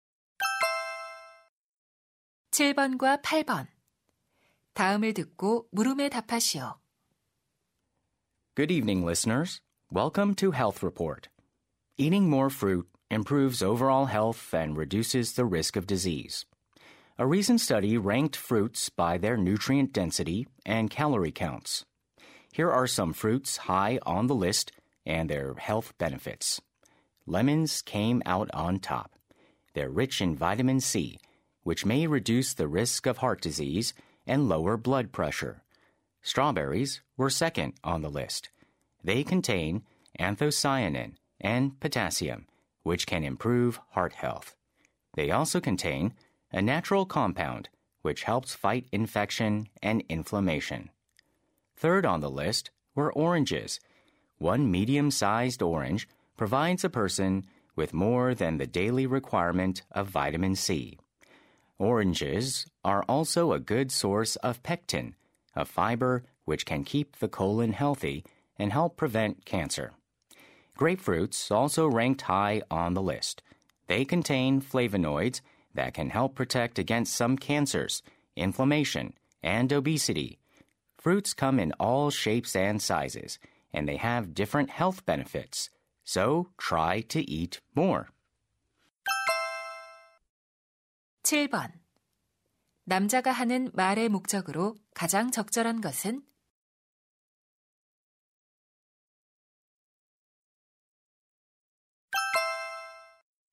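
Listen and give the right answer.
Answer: 건강에 좋은 과일들과 그 효능을 소개하려고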